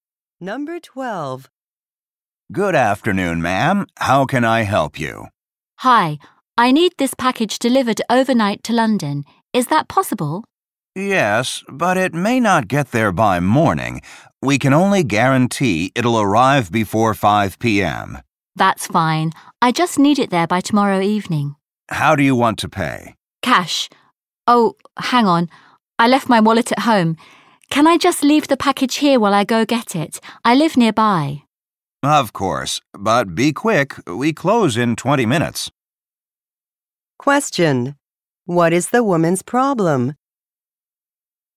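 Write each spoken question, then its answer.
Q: Question. What is the woman's problem?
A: She left her wallet at home.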